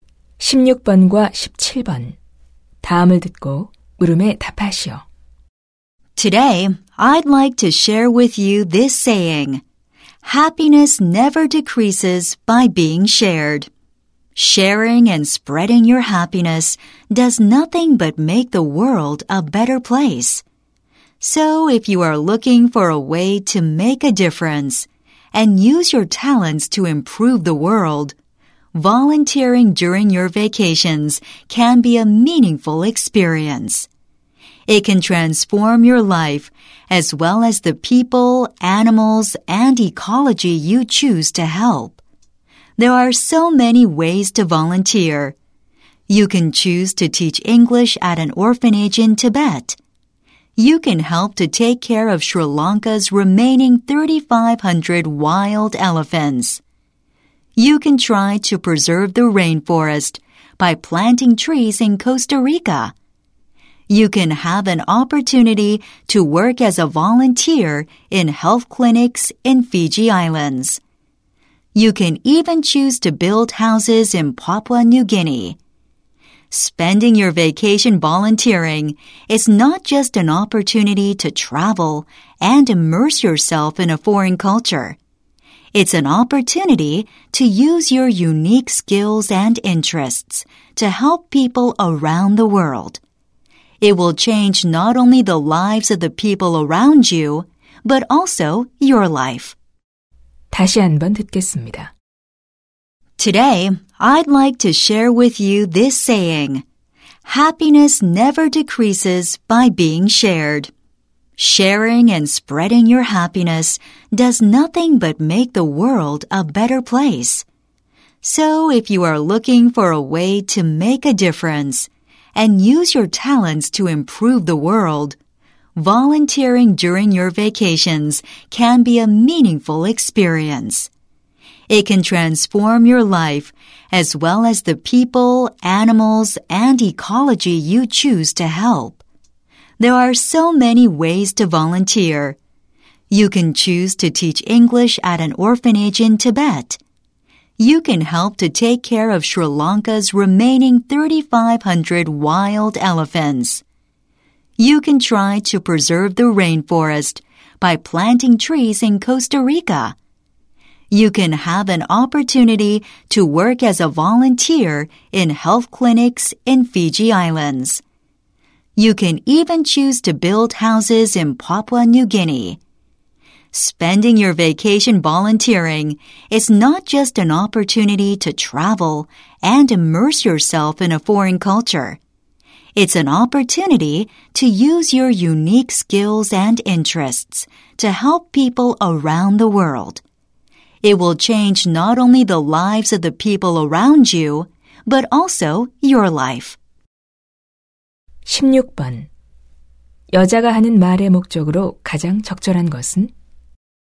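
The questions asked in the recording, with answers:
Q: 여자가 하는 말의 목적으로 가장 적절한 것은?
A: 휴가 중 자원봉사 활동을 권장하려고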